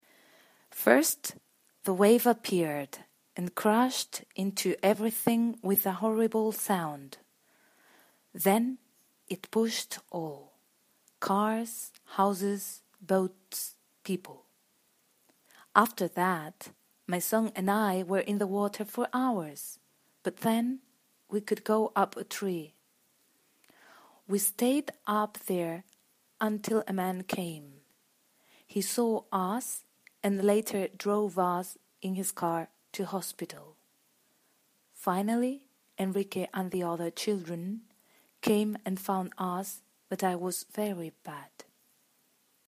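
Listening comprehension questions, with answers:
4. Ordena las oraciones del ejercicio anterior según la información de este audio:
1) My son and I/ rest on a tree/ when a man/ take us to hospital:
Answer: 3

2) While I drown/I find one of my sons/ in the current of water:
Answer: 2

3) When my husband and my other sons/ arrive at hospital/ I die:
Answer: 4

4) We heard a very horrible noise. I look around/ when I see the wall of water:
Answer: 1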